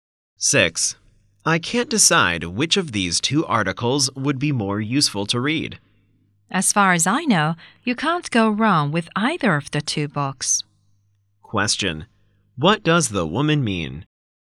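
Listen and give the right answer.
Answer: Both are useful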